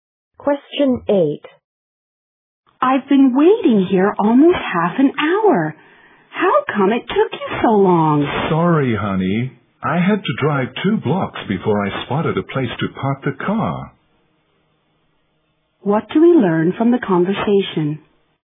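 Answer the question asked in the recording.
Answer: The man was late because it was hard to find a parking space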